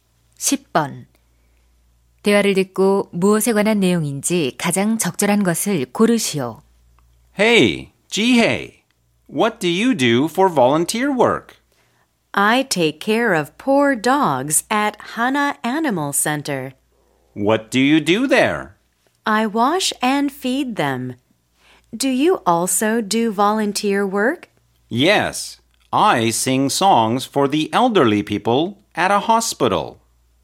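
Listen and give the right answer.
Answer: 자원봉사 활동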